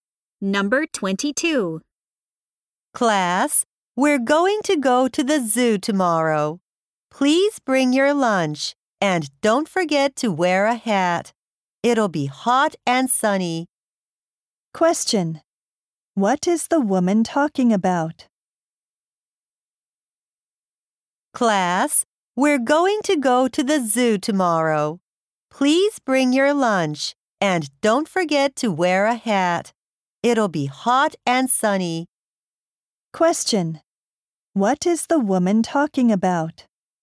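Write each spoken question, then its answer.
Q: What is the woman talking about?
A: A class trip to the zoo tomorrow.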